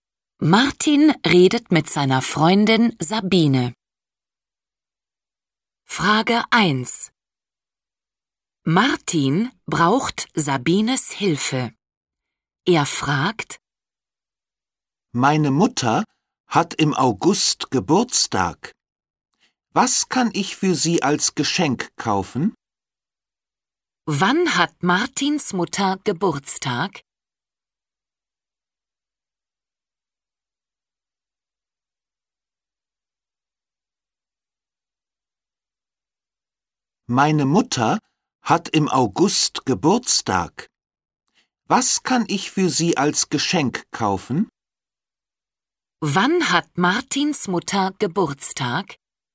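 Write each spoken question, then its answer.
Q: Wann hat Martins Mutter Geburtstag?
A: im August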